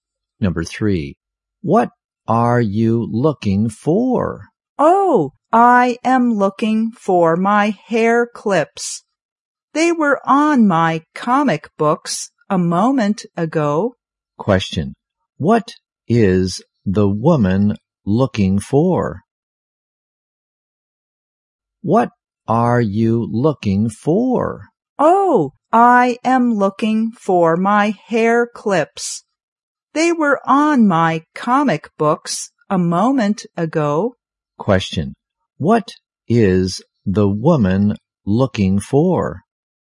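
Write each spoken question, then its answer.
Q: Question, what is the woman looking for?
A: Her hair clips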